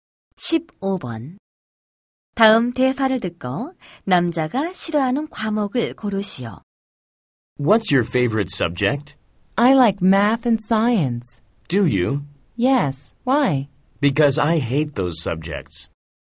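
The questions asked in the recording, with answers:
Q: 다음 대화를 듣고 남자가 싫어하는 과목을 고르시오.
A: 수학과 과학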